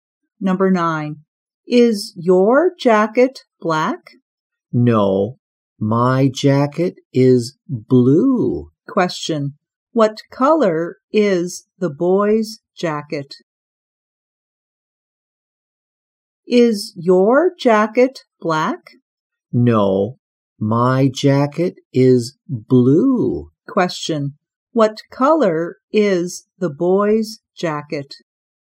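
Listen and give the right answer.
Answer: Blue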